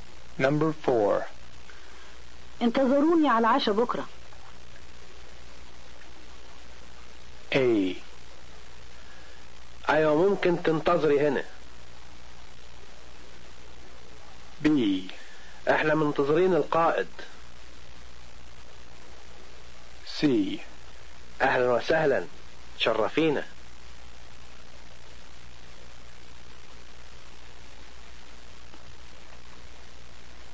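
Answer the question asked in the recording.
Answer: C: اهلا وسهلا تشرفينا.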